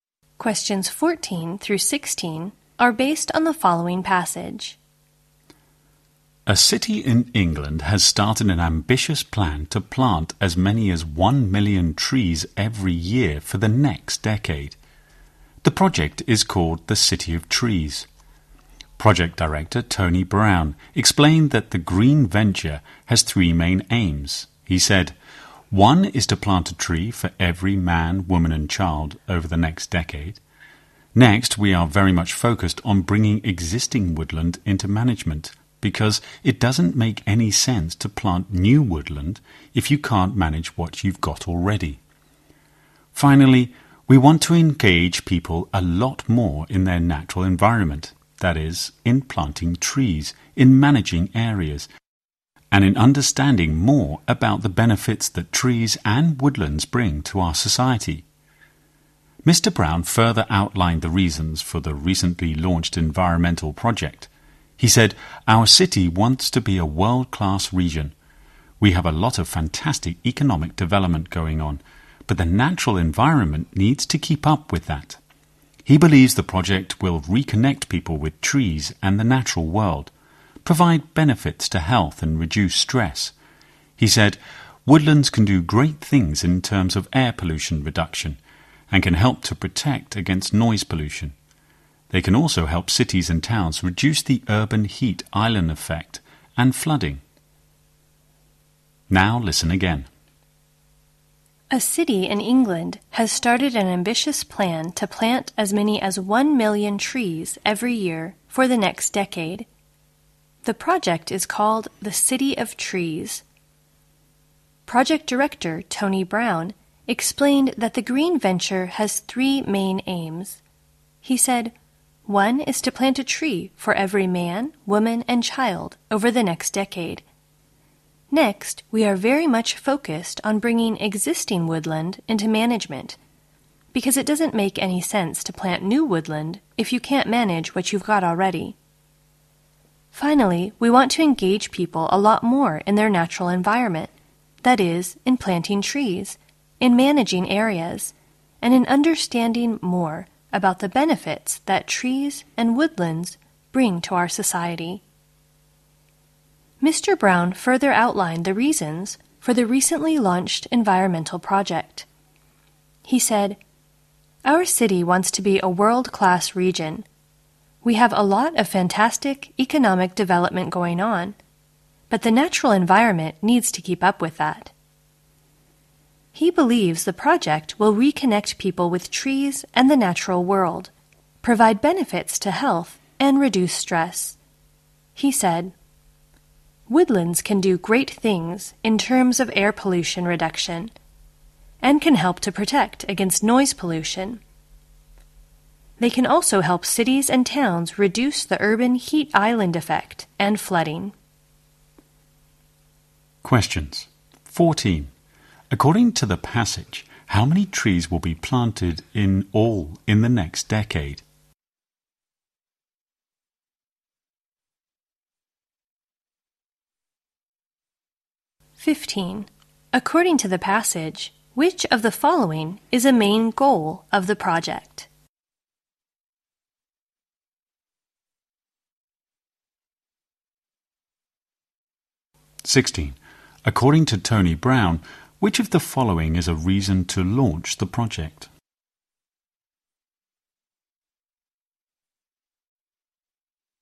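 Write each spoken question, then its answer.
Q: According to the passage, how many trees will be planted in all in the next decade?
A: About 10 million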